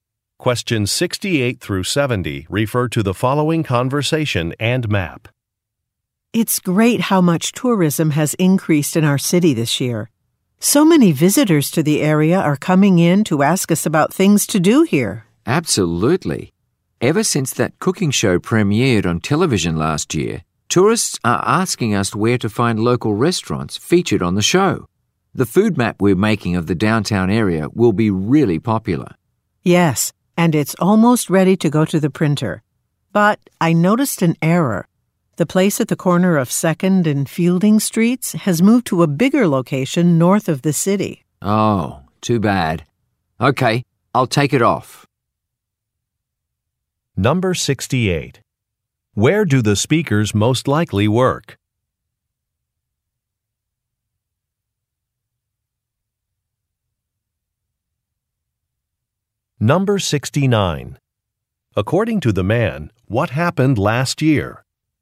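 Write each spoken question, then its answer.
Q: According to the man, what happened last year?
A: A cooking show premiered on television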